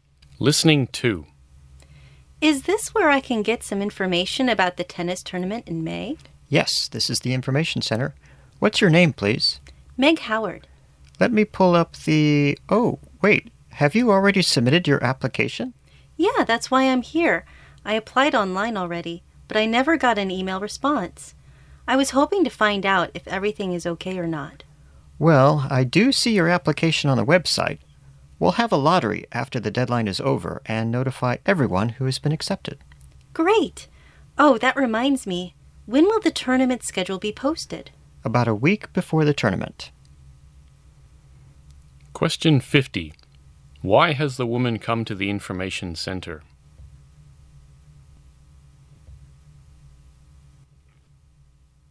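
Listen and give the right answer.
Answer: To check on the tennis tournament application she submitted online, since she never got an email response.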